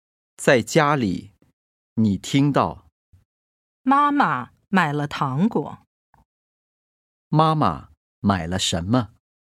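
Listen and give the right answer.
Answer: 糖果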